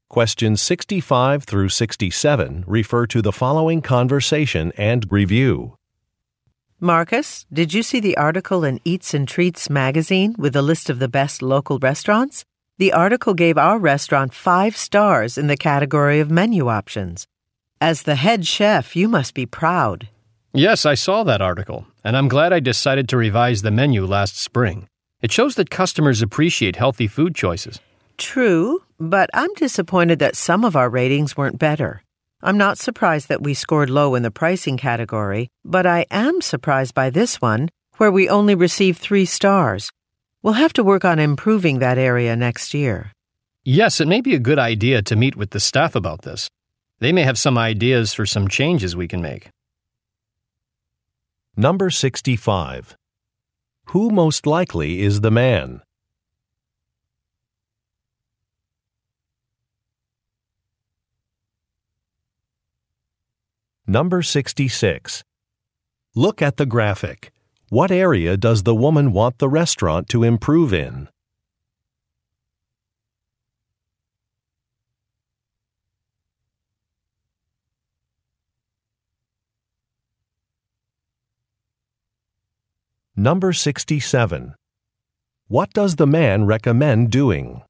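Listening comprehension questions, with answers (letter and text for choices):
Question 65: Who most likely is the man?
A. A financial advisor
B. A food critic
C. An editor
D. A chef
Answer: D. A chef

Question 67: What does the man recommend doing?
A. Renovating a ouilding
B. Asking employees for suggestions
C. Offering cooking classes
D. Providing foot samples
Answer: B. Asking employees for suggestions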